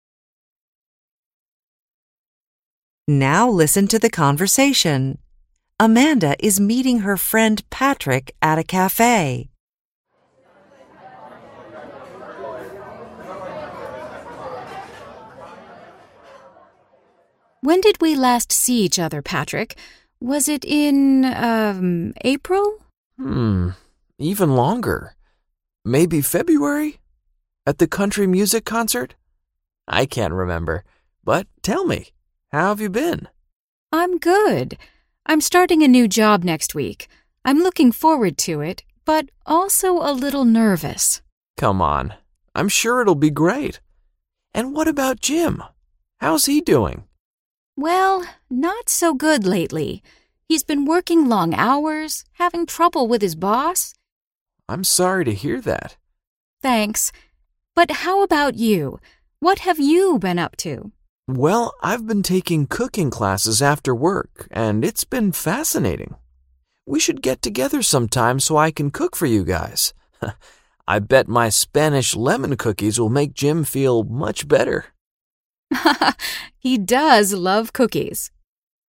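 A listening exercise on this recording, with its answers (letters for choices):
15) Amanda ____.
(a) has found a new job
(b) is looking for another job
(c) finds her work too challenging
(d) has been having problems at work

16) Patrick ____.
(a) has been learning Spanish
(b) isn't enjoying his cooking class very much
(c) has been all over the world lately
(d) wants to cook for Amanda and Jim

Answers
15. a
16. d

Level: INTERMEDIATE HYBRID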